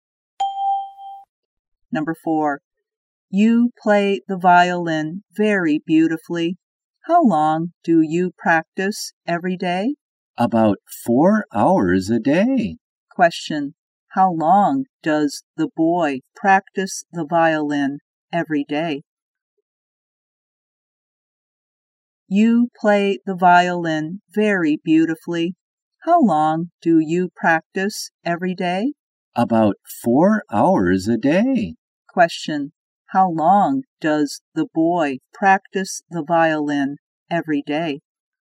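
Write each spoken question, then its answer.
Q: how long does the boy practice the violin every day?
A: About 4 hours a day.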